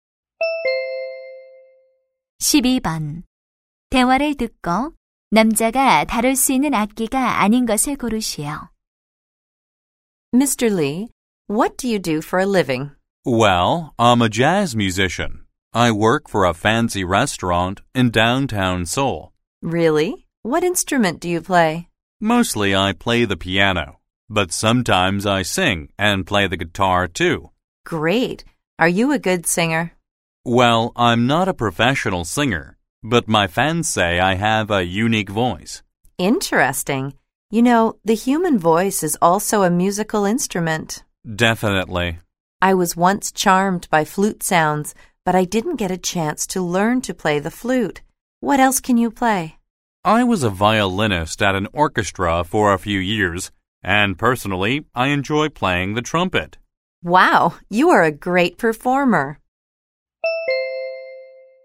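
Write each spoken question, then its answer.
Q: 대화를 듣고 남자가 다룰 수 있는 악기가 아닌 것을 고르시오.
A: 플루트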